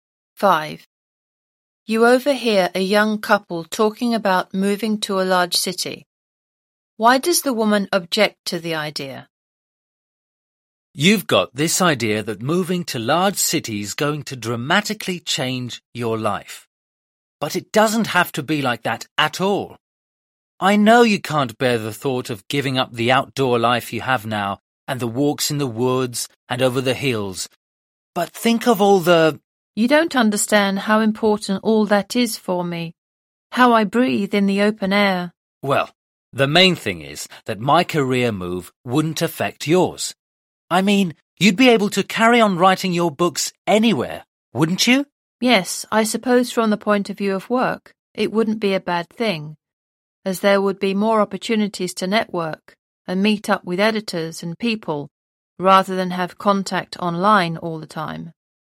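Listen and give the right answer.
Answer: She doesn't want to give up her outdoor life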